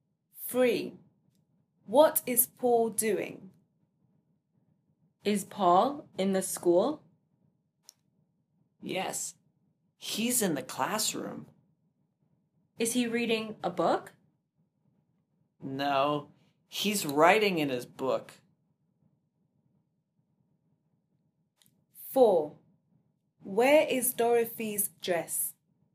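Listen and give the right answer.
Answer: Writing in his book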